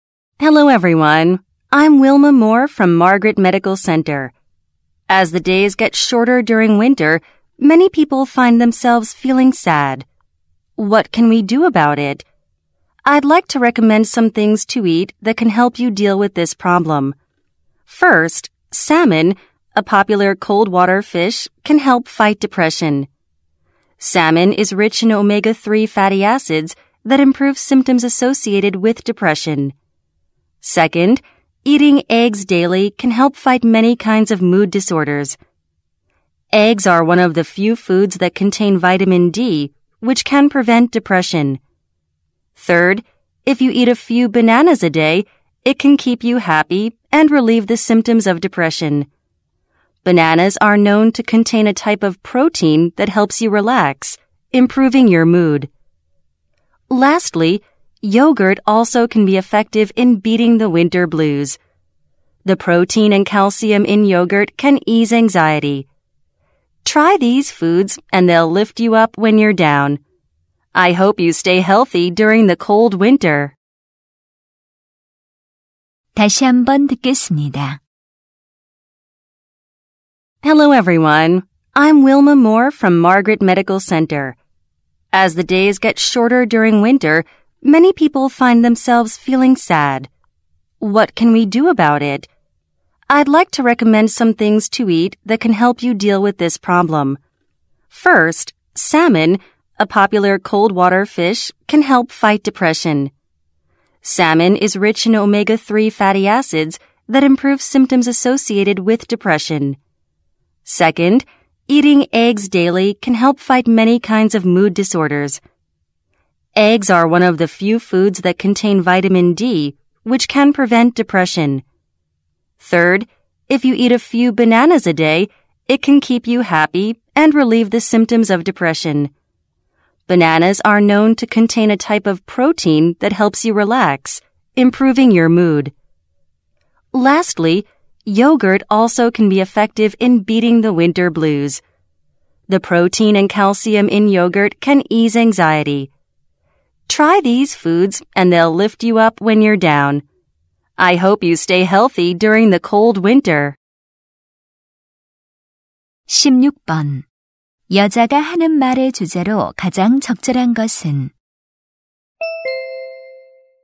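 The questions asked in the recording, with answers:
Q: 여자가 하는 말의 주제로 가장 적절한 것은?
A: 겨울 우울증 극복에 도움이 되는 음식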